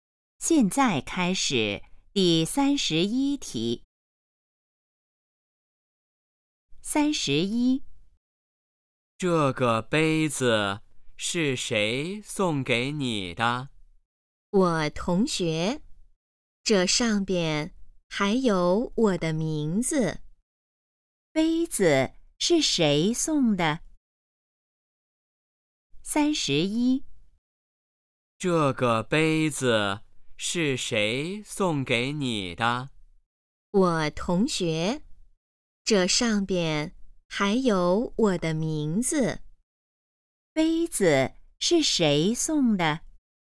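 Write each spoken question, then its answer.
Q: 杯子是谁送的?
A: 同学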